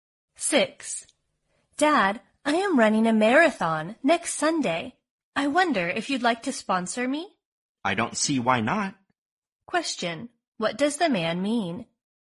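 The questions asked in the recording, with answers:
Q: What does the man mean?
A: He is willing to sponsor her.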